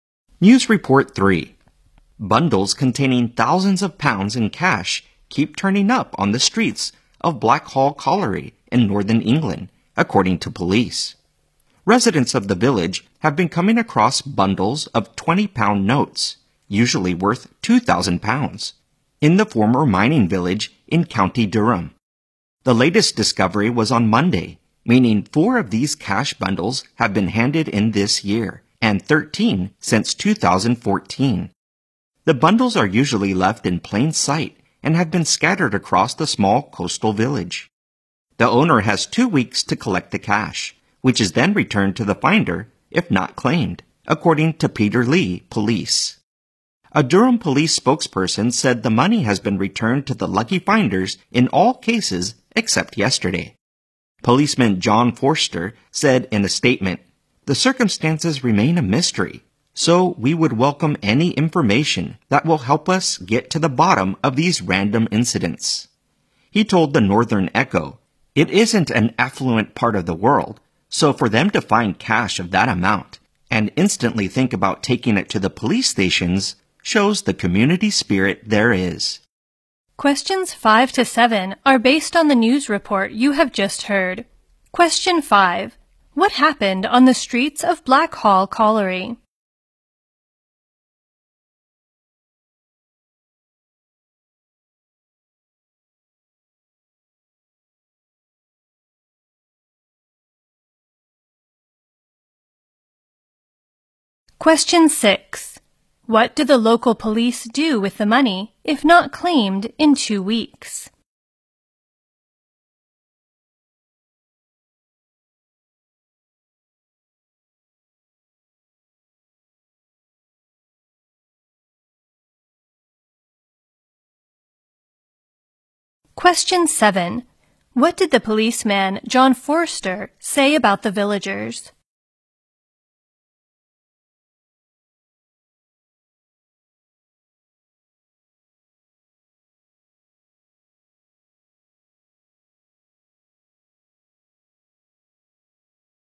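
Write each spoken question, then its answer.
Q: What happened on the streets of Blackhall Colliery?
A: Bundles of cash kept turning up

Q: What do the local police do with the money if not claimed in 2 weeks?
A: Return it to the finder

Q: What did the policeman, John Forster, say about the villagers?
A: They showed community spirit by handing the cash in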